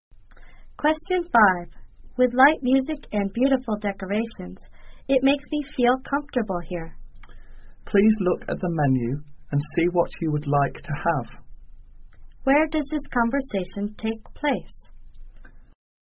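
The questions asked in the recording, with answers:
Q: Where does this conversation take place?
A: In a restaurant.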